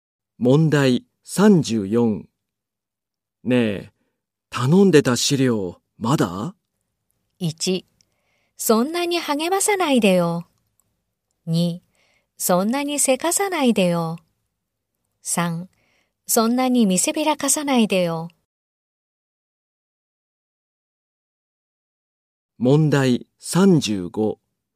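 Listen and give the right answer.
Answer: 2: そんなにせかさないでよ。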